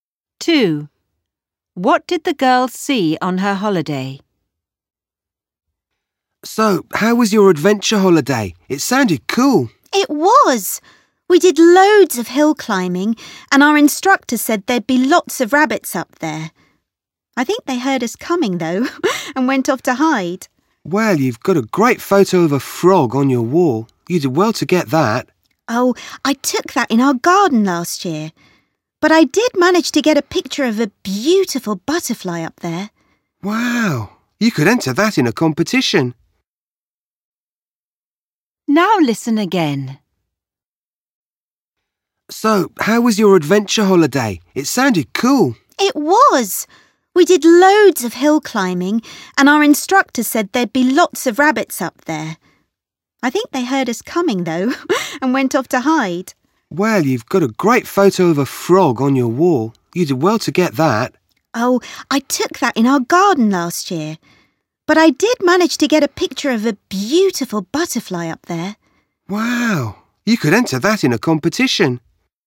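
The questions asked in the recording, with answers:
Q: What did the girl see on her holiday?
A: A butterfly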